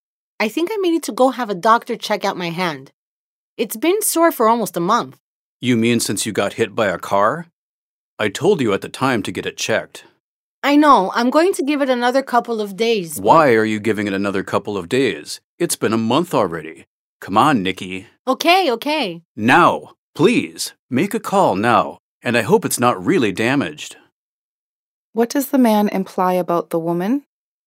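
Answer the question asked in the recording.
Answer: She should have had her hand checked by a doctor long ago; she keeps putting it off.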